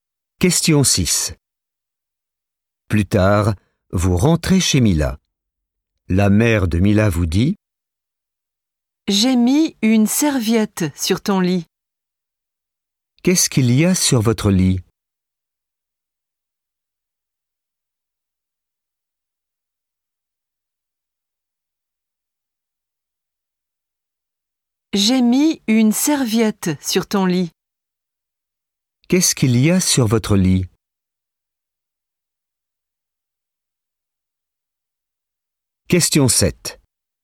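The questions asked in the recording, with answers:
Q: Qu'est-ce qu'il y a sur votre lit?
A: Une serviette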